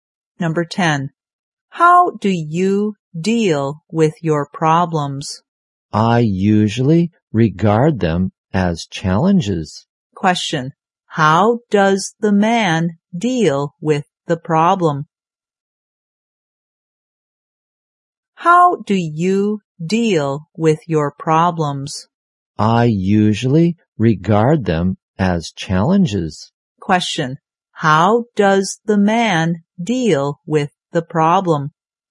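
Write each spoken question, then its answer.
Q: How does the man deal with the problem?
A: He regards them as challenges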